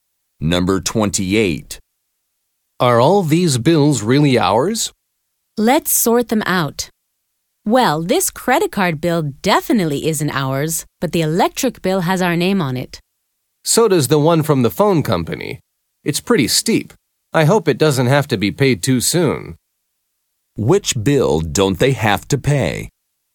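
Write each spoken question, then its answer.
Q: Which bill don't they have to pay?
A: The credit card bill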